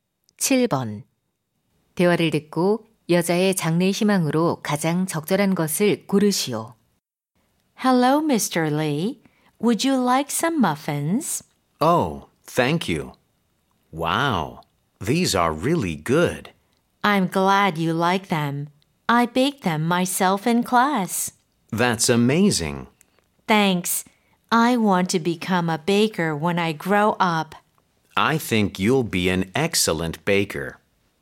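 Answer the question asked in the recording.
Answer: 제빵사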